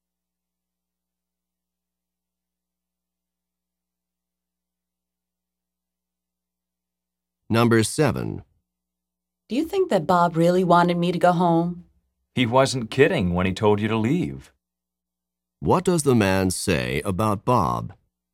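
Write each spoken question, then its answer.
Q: What does the man say about Bob?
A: Bob was serious; he really wanted her to leave.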